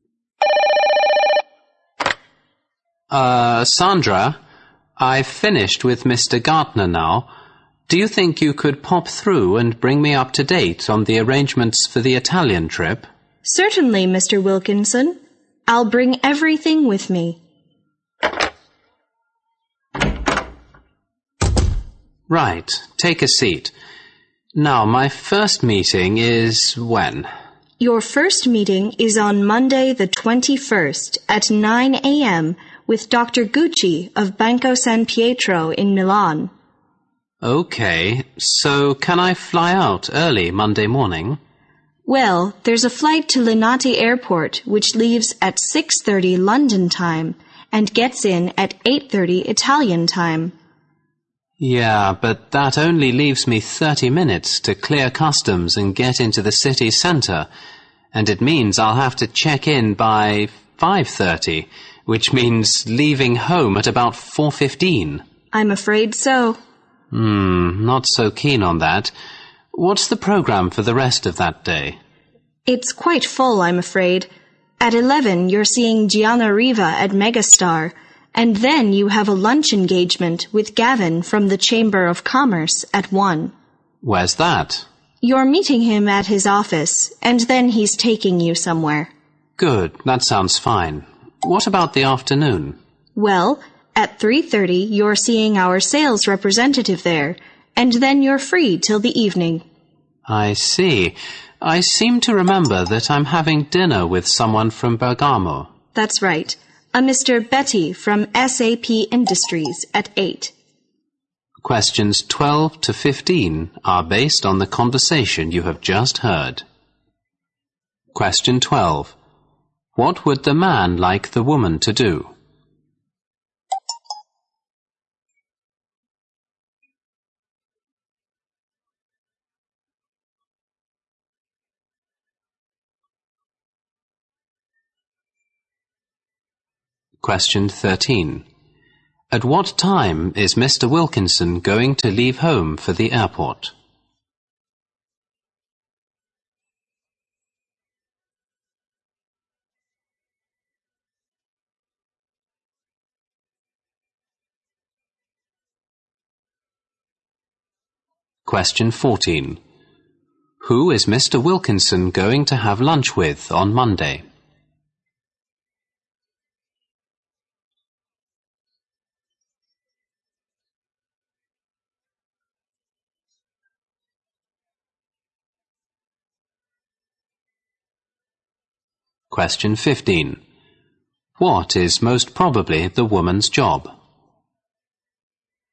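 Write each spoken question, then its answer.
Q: What would the man like the woman to do?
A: Tell him about the arrangements for the Italian trip

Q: At what time is Mr. Wilkinson going to leave home for the airport?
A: At about 4:15

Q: Who is Mr. Wilkinson going to have lunch with on Monday?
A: Gavin from the Chamber of Commerce

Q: What is most probably the woman's job?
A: Secretary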